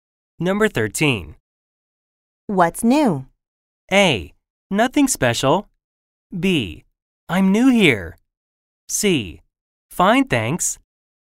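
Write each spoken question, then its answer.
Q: What's new?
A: A: Nothing special.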